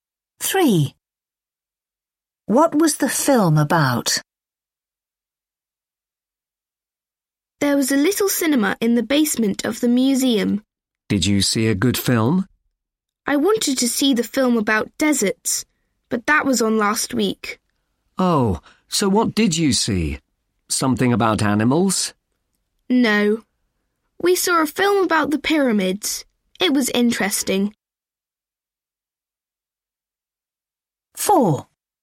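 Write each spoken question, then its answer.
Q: What was the film about?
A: the pyramids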